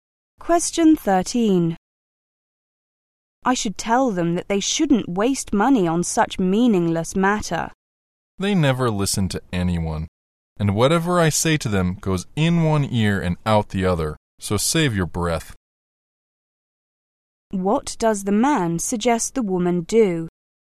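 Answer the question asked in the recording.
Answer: Not bother telling them, since they won't listen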